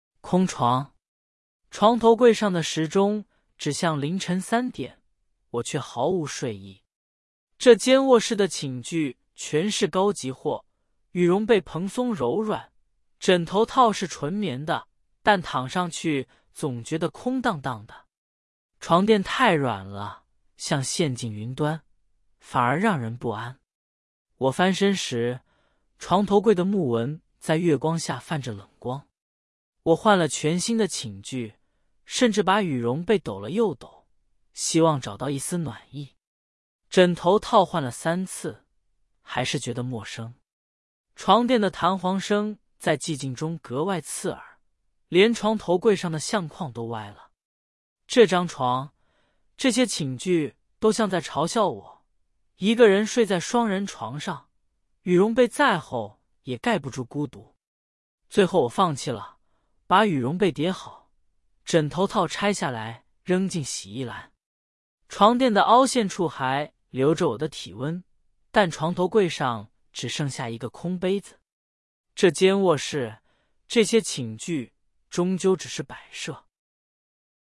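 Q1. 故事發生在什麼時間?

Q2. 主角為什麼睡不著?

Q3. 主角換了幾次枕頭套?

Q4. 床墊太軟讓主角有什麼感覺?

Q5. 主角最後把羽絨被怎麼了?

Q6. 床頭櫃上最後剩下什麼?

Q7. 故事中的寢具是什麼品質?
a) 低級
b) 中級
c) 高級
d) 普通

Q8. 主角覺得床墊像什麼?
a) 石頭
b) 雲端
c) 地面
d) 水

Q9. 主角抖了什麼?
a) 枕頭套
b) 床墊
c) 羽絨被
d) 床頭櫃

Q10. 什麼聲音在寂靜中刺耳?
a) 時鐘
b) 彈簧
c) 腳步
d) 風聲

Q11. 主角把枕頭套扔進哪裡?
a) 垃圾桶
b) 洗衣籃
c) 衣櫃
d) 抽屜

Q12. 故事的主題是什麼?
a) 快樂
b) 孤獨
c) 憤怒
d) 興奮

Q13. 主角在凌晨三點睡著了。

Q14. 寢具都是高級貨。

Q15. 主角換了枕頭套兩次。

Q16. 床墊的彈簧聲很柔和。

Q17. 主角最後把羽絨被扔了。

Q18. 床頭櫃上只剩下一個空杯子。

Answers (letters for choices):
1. 凌晨三點
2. 一個人睡在雙人床上,覺得孤獨、空蕩蕩的
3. 三次
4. 不安
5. 疊好了
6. 一個空杯子
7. c
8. b
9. c
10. b
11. b
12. b
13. 錯
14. 對
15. 錯
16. 錯
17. 錯
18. 對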